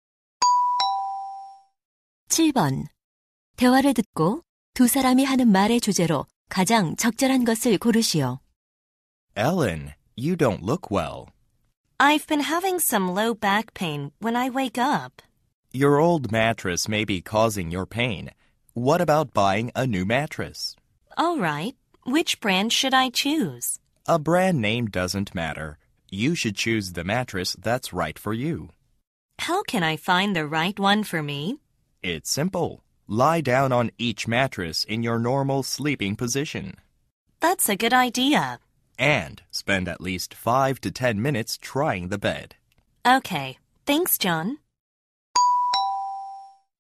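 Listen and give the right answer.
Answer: 자신에게 맞는 매트리스 고르는 법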